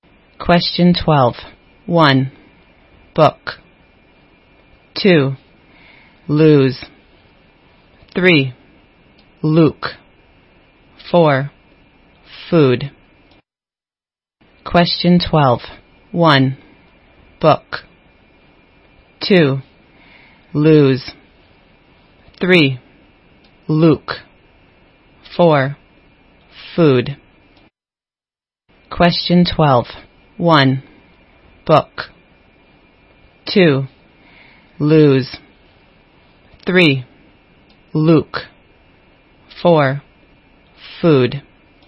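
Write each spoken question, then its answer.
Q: Question 12. 1. Book. 2. Lose.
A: 1: book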